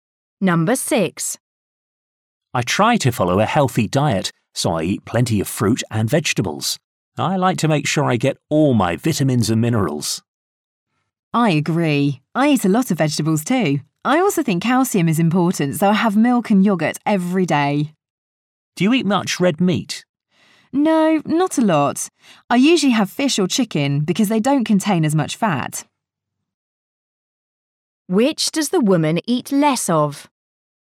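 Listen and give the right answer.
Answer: Red meat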